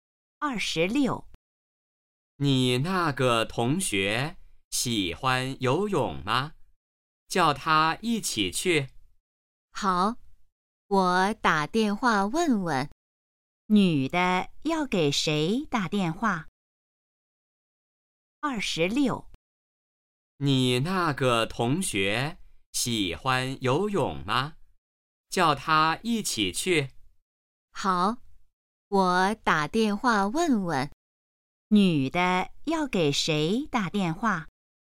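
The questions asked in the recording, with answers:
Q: 女的要给谁打电话?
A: 同学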